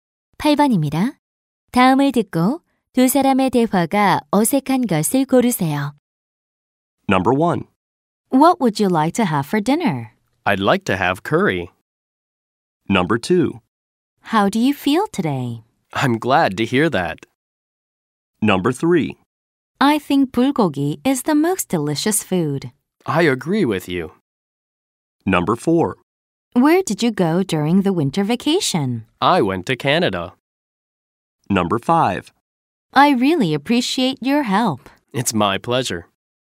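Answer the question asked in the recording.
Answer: 2번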